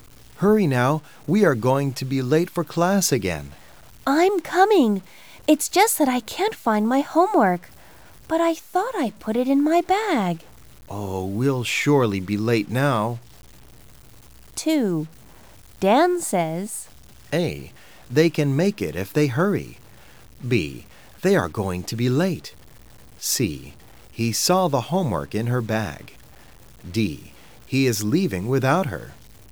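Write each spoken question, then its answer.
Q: Dan says,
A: B: They are going to be late.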